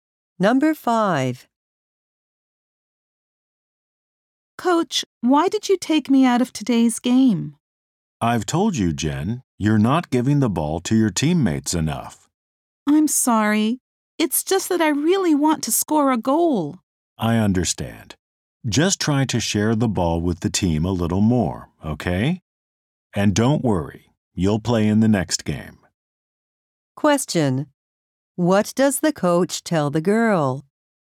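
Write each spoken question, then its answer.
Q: What does the coach tell the girl?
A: To pass the ball to her teammates more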